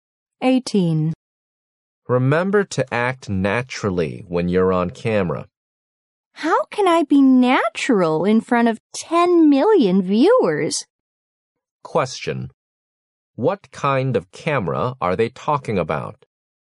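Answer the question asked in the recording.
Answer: A television camera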